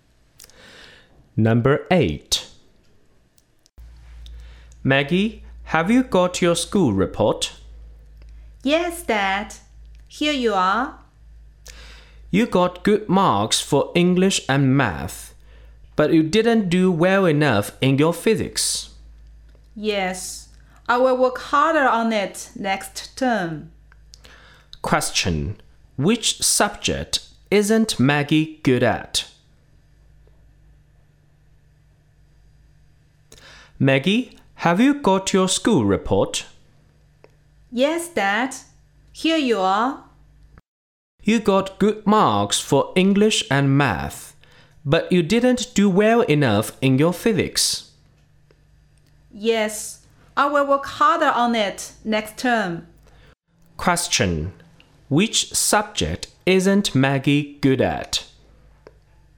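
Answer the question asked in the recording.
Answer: Physics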